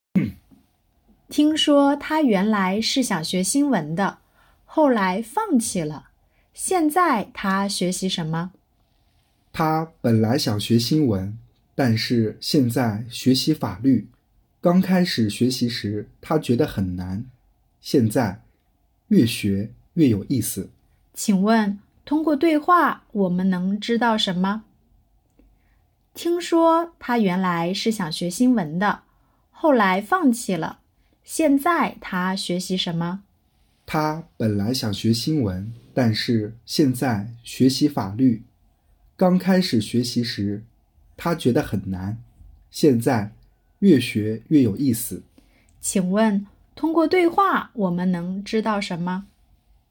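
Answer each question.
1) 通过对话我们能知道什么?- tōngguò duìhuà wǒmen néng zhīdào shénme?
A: 他现在学习法律,越学越有意思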